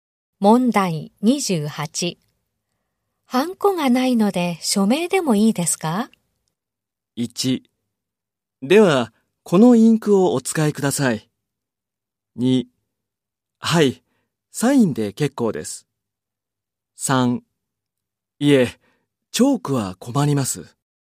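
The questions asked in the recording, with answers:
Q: ハンコがないので署名でもいいですか?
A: 2: はい、サインで結構です。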